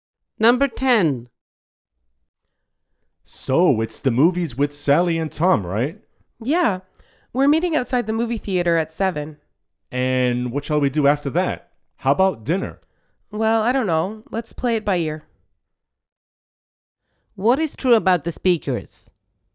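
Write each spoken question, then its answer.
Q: What is true about the speakers?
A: They haven't decided what to do after the movie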